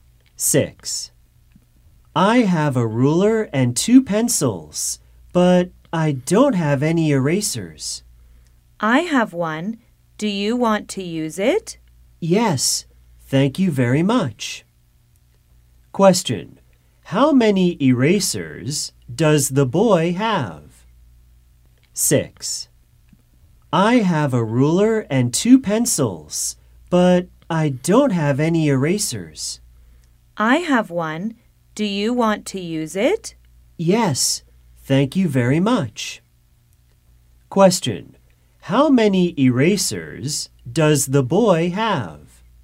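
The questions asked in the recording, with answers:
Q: How many erasers does the boy have?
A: None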